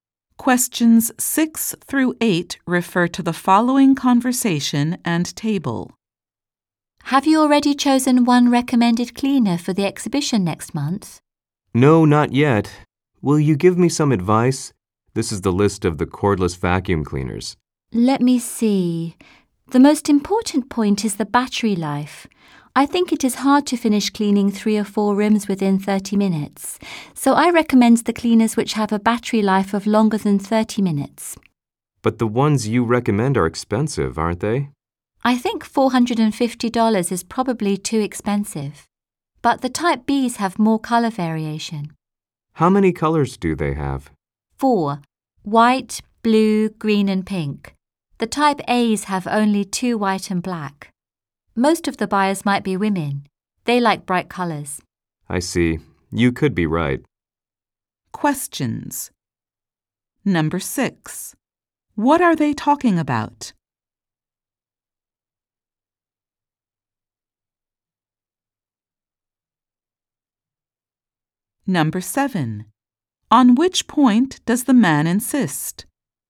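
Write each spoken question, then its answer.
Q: What are they talking about?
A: Which cordless vacuum cleaner to recommend for next month's exhibition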